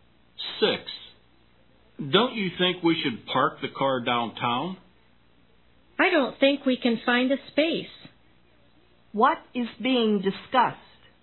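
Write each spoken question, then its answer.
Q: What is being discussed?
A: Where to park the car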